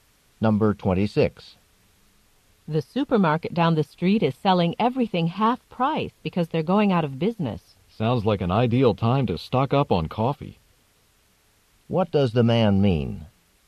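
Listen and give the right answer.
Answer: He wants to buy a lot of coffee while it's half price.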